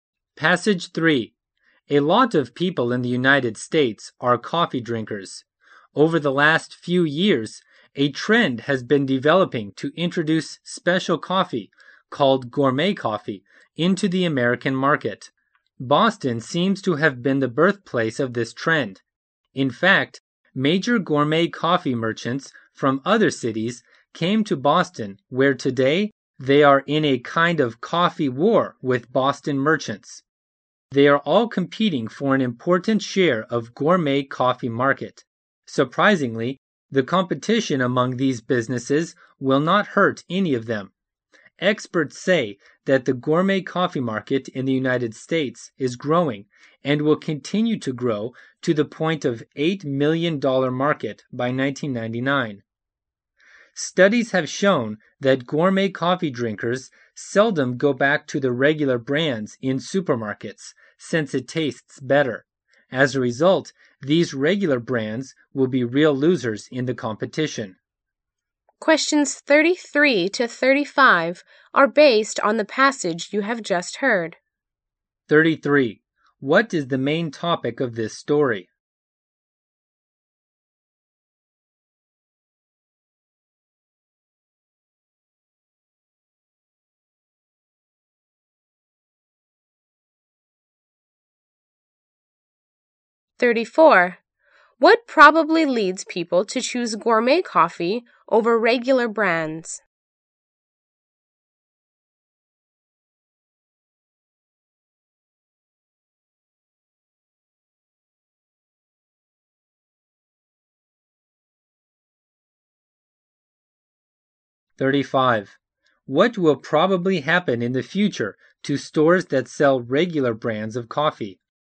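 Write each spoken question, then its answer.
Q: What is the main topic of this story?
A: The growing gourmet coffee market and its competition

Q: What probably leads people to choose gourmet coffee over regular brands?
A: It tastes better

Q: What will probably happen in the future to stores that sell regular brands of coffee?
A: They will lose business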